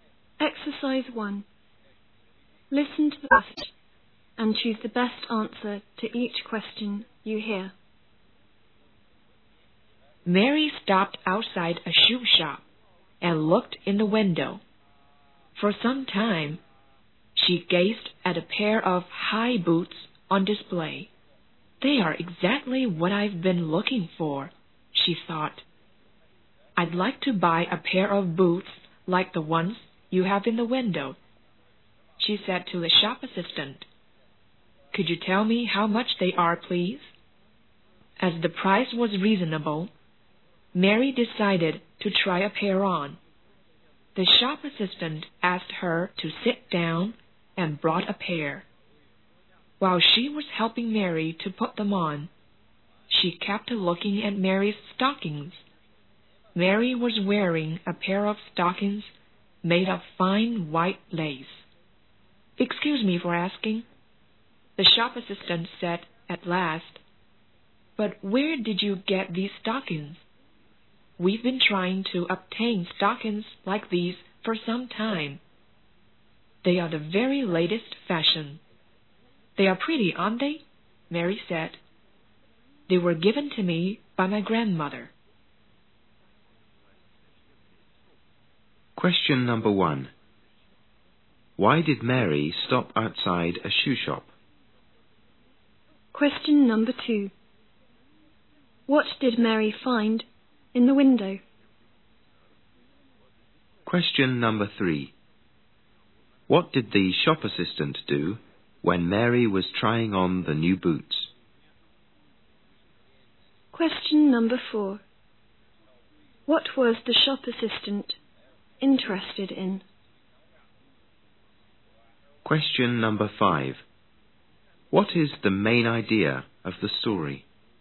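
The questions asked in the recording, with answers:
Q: Why did Mary stop outside a shoe shop?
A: She saw a pair of high boots she had been looking for in the window

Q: What did Mary find in the window?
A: A pair of high boots

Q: What did the shop assistant do when Mary was trying on the new boots?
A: She kept looking at Mary's stockings

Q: What was the shop assistant interested in?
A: Mary's white lace stockings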